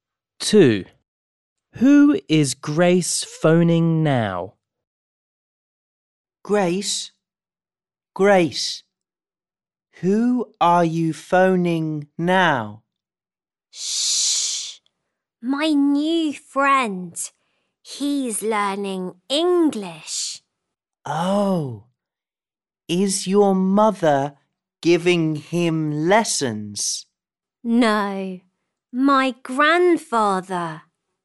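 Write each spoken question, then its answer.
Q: Who is Grace phoning now?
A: Her new friend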